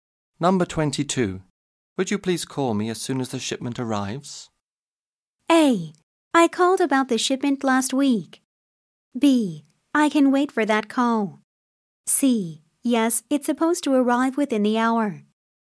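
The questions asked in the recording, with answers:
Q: Would you please call me as soon as the shipment arrives?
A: C: Yes, it's supposed to arrive within the hour.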